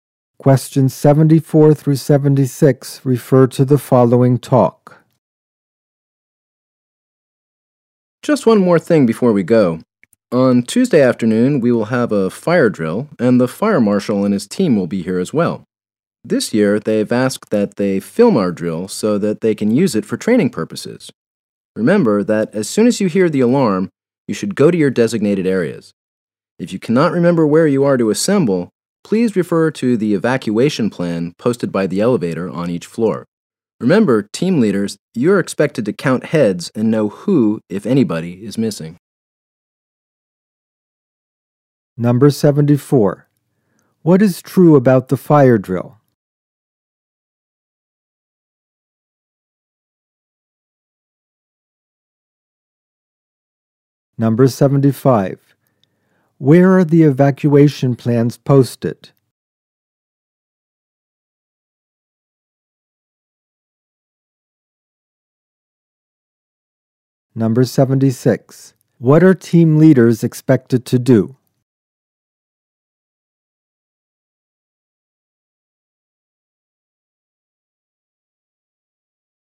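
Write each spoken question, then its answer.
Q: Where are the evacuation plans posted?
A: By the elevator on each floor

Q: What are team leaders expected to do?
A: Count heads and know who is missing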